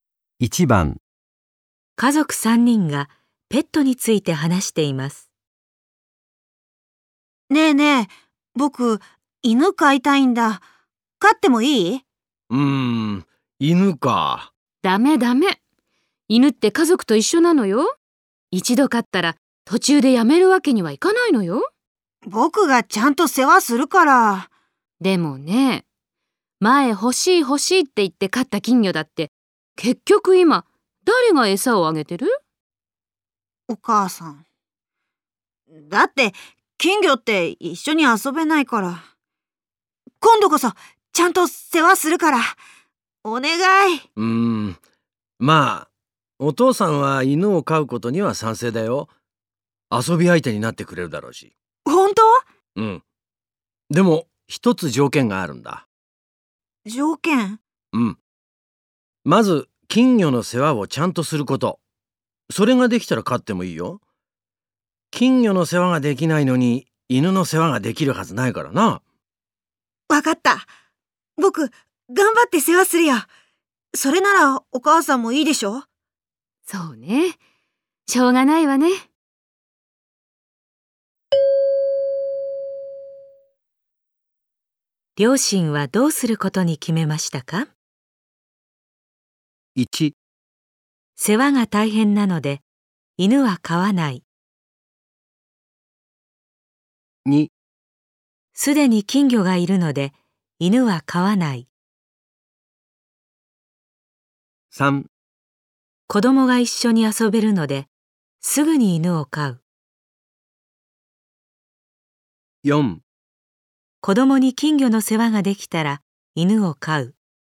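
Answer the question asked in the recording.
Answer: 4: 子供に金魚の世話ができたら犬を飼う。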